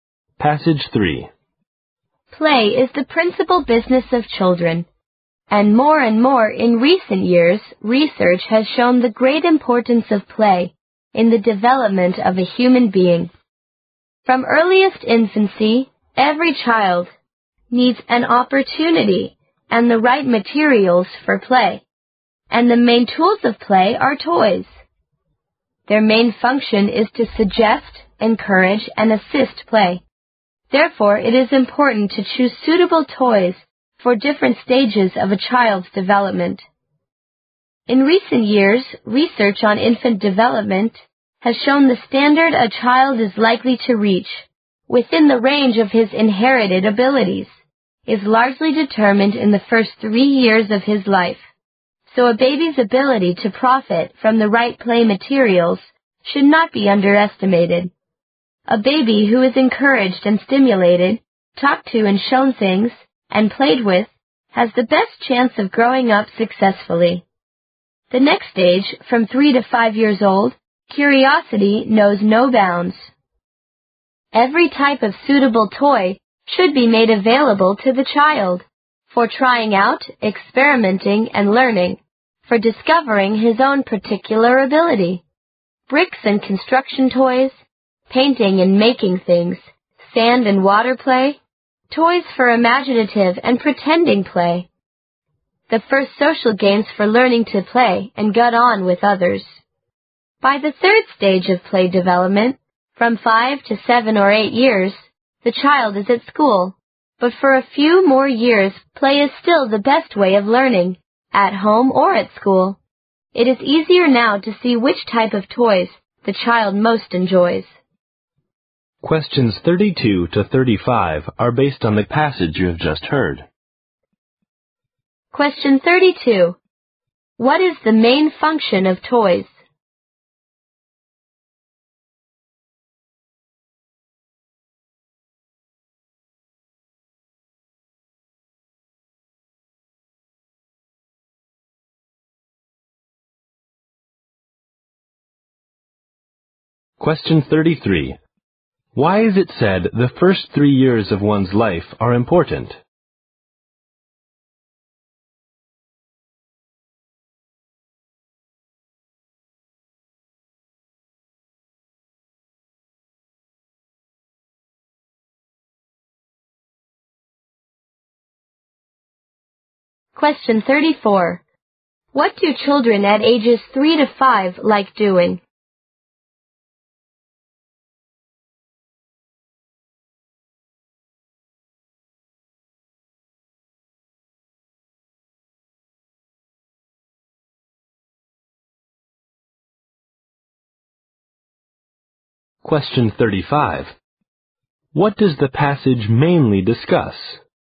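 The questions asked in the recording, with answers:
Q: What is the main function of toys?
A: To suggest, encourage and assist play

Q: Why is it said the first 3 years of one's life are important?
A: They largely determine the standard a child is likely to reach

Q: What do children at ages 3 to 5 like doing?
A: Trying out, experimenting and learning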